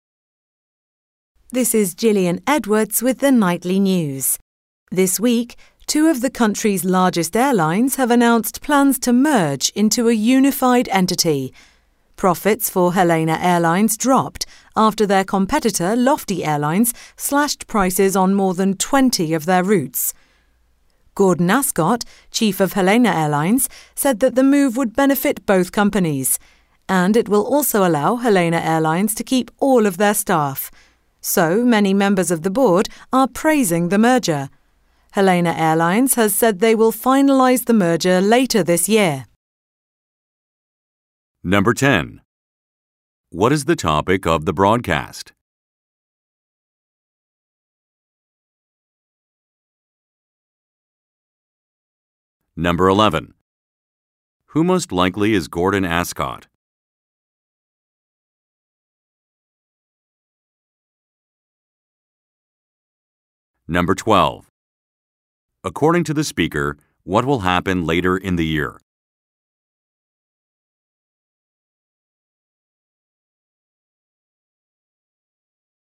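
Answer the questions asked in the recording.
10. A merger of two airlines
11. The chief of Helena Airlines
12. Helena Airlines will finalize the merger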